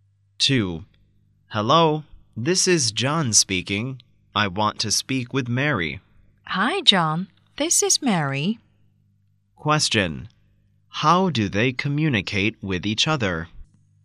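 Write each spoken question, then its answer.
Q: How do they communicate with each other?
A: By telephone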